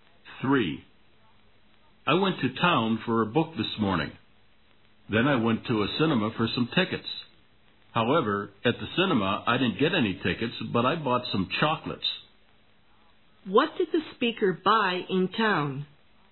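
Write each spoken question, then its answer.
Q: What did the speaker buy in town?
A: A book and some chocolates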